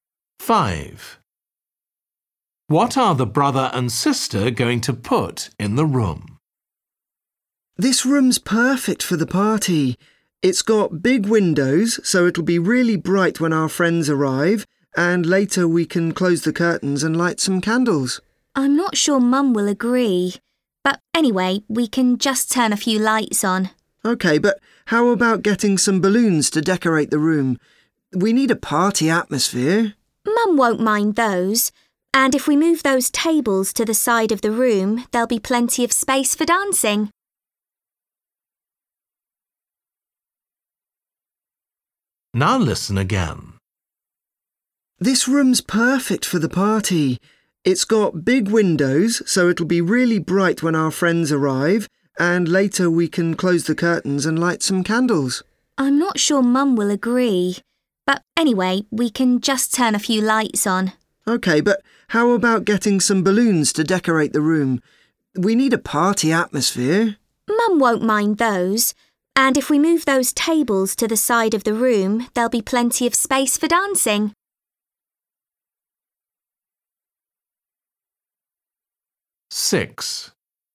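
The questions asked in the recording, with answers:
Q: What are the brother and sister going to put in the room?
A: balloons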